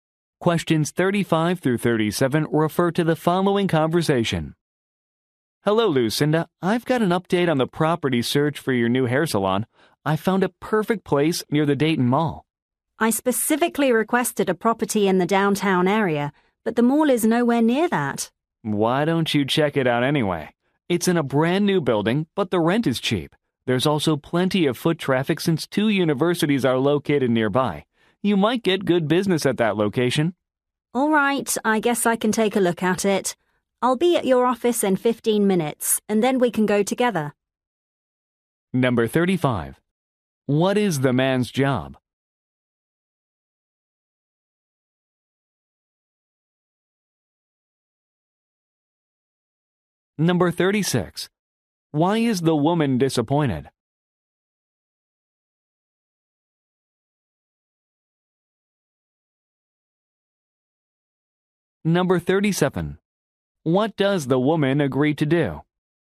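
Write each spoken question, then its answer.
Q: What is the man's job?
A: Real estate agent

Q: Why is the woman disappointed?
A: The property is not in the downtown area

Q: What does the woman agree to do?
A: Go and look at the property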